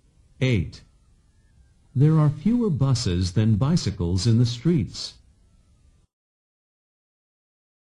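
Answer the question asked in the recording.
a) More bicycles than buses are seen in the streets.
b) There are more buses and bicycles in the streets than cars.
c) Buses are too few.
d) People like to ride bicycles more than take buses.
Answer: a) More bicycles than buses are seen in the streets.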